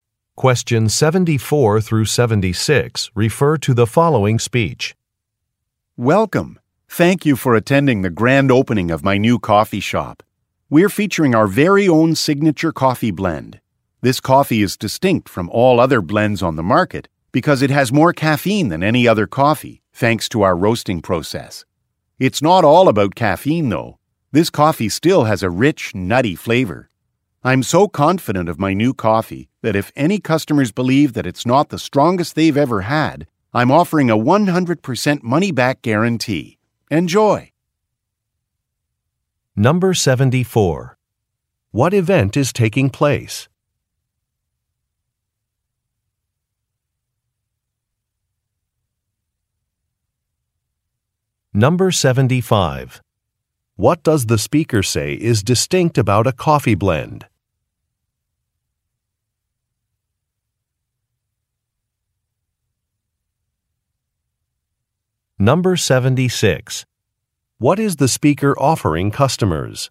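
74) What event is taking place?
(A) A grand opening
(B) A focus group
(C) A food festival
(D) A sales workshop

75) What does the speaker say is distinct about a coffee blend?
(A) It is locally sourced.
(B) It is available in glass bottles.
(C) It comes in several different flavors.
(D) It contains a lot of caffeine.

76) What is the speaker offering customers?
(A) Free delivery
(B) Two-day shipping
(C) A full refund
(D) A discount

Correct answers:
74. (A) A grand opening
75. (D) It contains a lot of caffeine.
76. (C) A full refund

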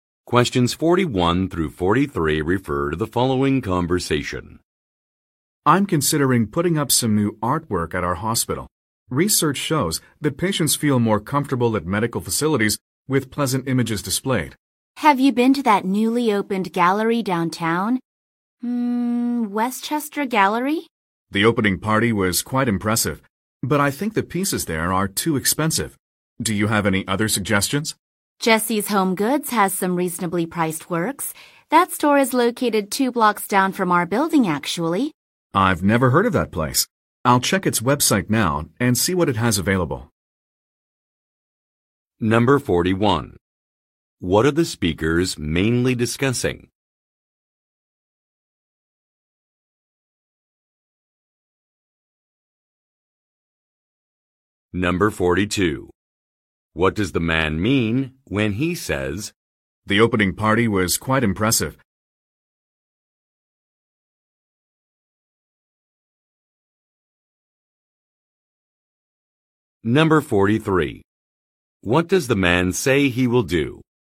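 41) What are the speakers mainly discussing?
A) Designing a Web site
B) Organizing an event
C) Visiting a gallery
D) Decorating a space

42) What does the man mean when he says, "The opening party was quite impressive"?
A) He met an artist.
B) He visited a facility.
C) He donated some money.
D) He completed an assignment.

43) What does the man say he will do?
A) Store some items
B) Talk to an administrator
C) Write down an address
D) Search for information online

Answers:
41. D) Decorating a space
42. B) He visited a facility.
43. D) Search for information online

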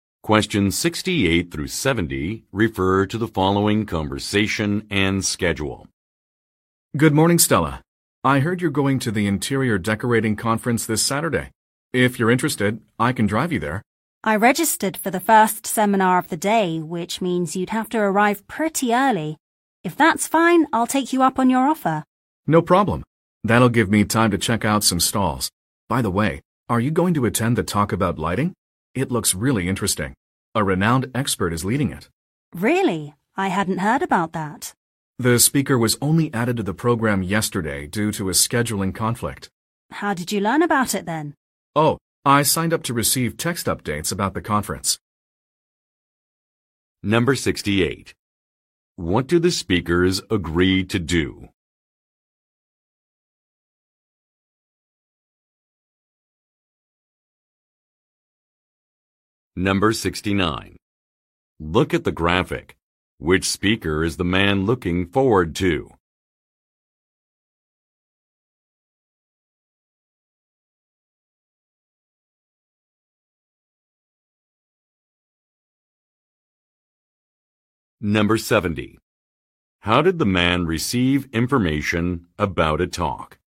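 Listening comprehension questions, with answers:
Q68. What do the speakers agree to do?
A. Change a lecture topic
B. Travel to an event together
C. Ask for a deadline extension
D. Get advice from an organizer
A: B. Travel to an event together

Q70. How did the man receive information about a talk?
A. By asking event staff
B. By registering for notifications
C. By streaming a video online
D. By downloading a newsletter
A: B. By registering for notifications

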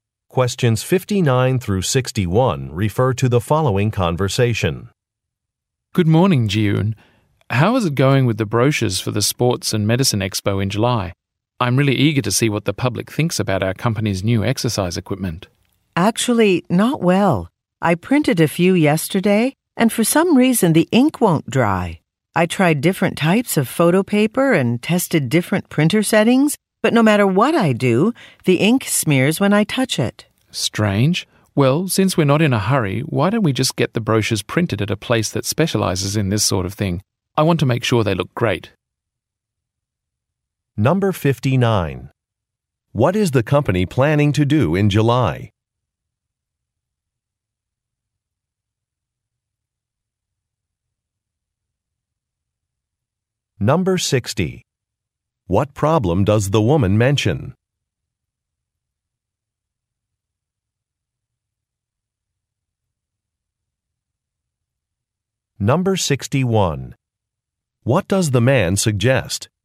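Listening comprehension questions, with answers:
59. What is the company planning to do in July?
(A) Announce a new president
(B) Participate in a product exhibition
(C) Hold a company picnic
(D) Buy some printing equipment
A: (B) Participate in a product exhibition

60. What problem does the woman mention?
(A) A document is not printing correctly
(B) Some expenses have not been approved.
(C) Some inventory is not selling well.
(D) An invitation was not received.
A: (A) A document is not printing correctly

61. What does the man suggest?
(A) Writing some new product descriptions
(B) Rearranging some photographs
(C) Getting consumer feedback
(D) Using a professional service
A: (D) Using a professional service

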